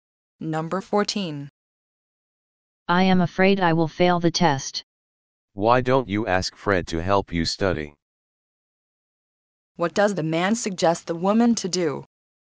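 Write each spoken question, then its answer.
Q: What does the man suggest the woman to do?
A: Ask Fred to help her study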